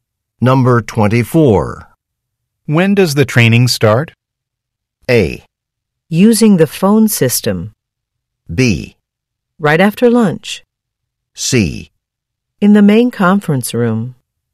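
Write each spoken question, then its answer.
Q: When does the training start?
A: B: Right after lunch.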